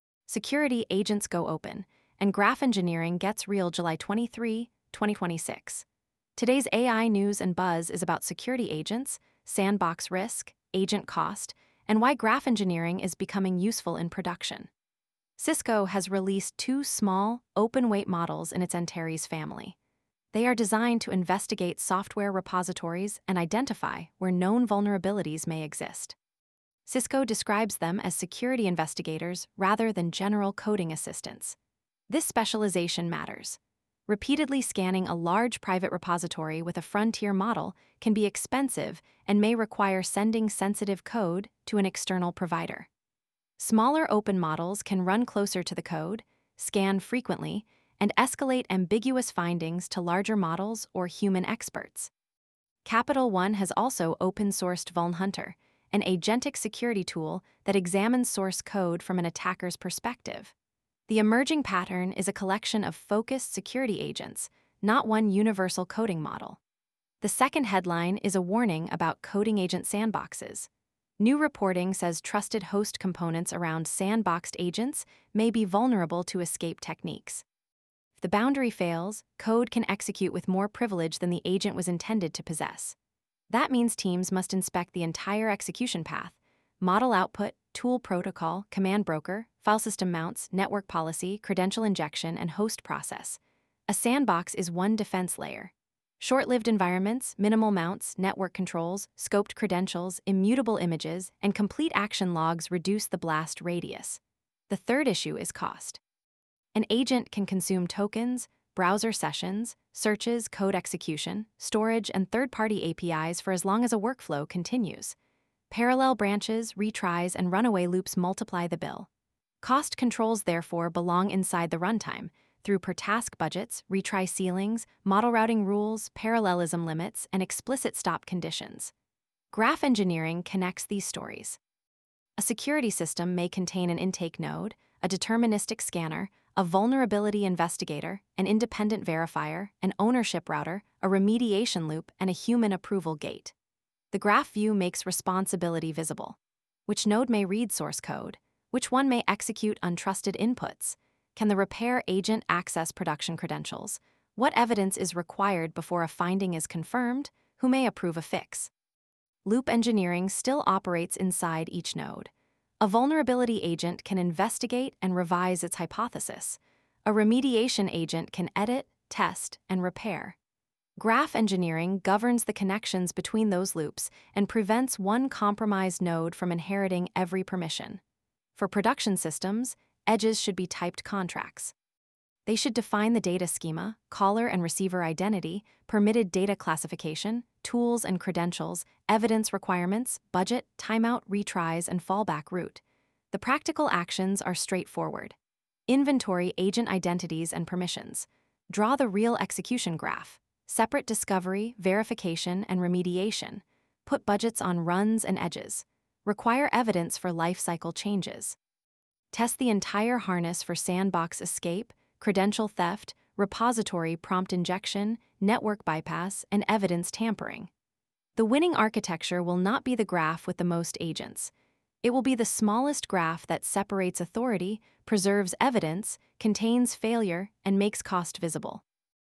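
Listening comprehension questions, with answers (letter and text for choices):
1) What distinguishes Cisco's Antares models in the latest security-agent news?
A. They are small open-weight models specialised for investigating software vulnerabilities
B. They are image generators for security dashboards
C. They replace every deterministic scanner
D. They require all source code to be public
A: A. They are small open-weight models specialised for investigating software vulnerabilities

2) Why is saying an agent is sandboxed not a complete security guarantee?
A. The surrounding host, tool broker, mounts, network, and credential path may still be exploitable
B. Sandboxes always disable testing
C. Agents cannot execute code in sandboxes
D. A sandbox automatically grants production access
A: A. The surrounding host, tool broker, mounts, network, and credential path may still be exploitable

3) What does Graph Engineering govern in a multi-agent security system?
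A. The nodes, permissions, evidence, state, and allowed transitions across the system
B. Only the wording of one prompt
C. Only the visual colour of a graph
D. The training data of every underlying model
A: A. The nodes, permissions, evidence, state, and allowed transitions across the system

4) Which control helps contain unpredictable agent cost?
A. Per-task budgets, retry ceilings, parallelism limits, and explicit stop conditions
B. Unlimited retries across every branch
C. Hiding model usage from observability tools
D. Giving every task the most expensive model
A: A. Per-task budgets, retry ceilings, parallelism limits, and explicit stop conditions

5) What is the safest relationship between discovery, verification, and remediation?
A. Separate responsibilities and require independent evidence before lifecycle transitions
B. Let one unrestricted agent discover, approve, merge, and deploy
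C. Skip verification when the model sounds confident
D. Share all credentials with every node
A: A. Separate responsibilities and require independent evidence before lifecycle transitions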